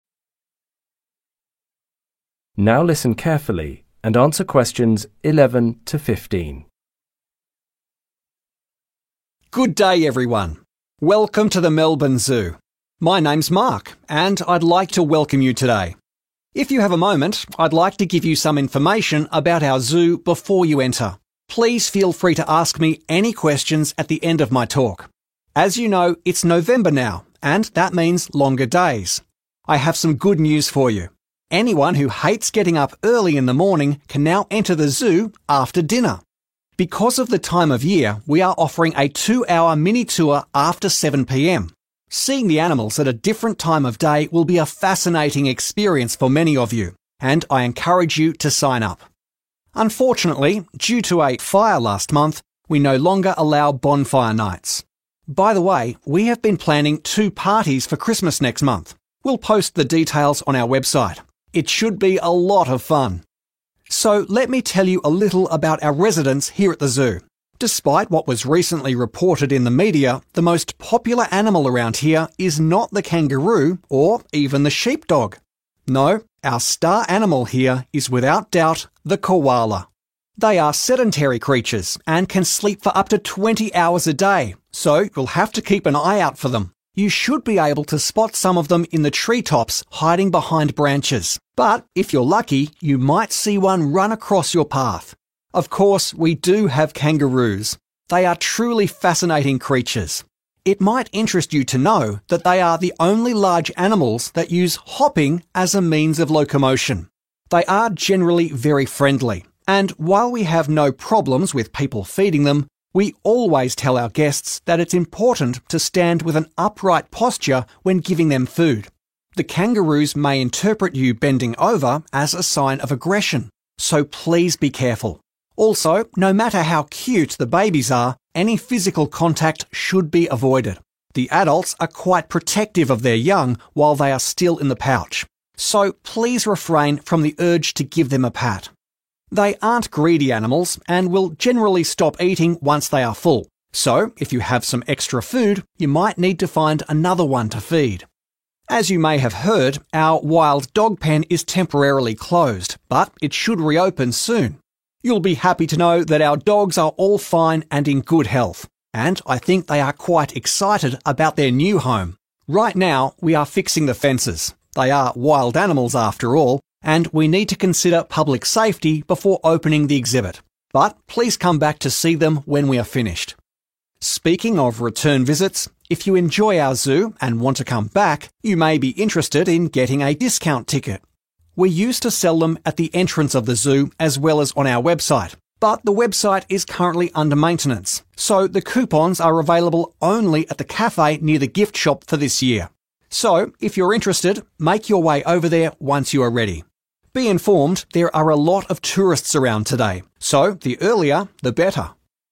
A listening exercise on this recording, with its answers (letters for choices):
Choose the correct letter A, B or C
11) What is the new activity in the zoo in November?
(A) evening tours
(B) bonfire nights for adults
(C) various parties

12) What is the most popular species in the zoo?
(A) kangaroo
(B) koala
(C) sheepdog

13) What is the key to feeding kangaroos?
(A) feeding more than one at a time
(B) gently touching the baby kangaroos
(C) standing up straight when feeding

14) Why is the wild dog area closed?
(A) The wild dogs are unwell.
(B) The enclosure is under repair.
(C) The dogs have not arrived.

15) Where can visitors get discount tickets this year?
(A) at the café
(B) on the official website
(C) at the gift shop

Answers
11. A
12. B
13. C
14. B
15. A